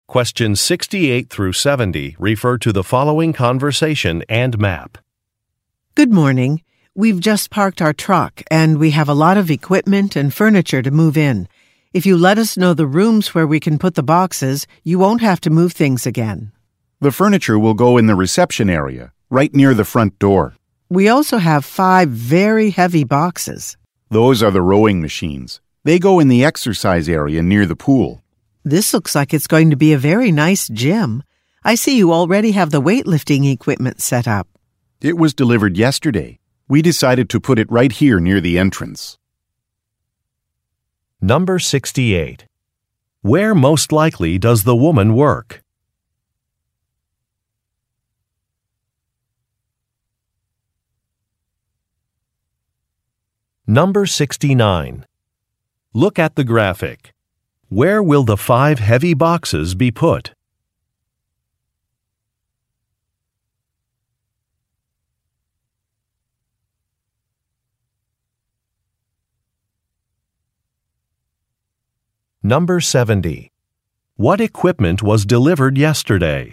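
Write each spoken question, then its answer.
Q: What equipment was delivered yesterday?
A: Weightlifting equipment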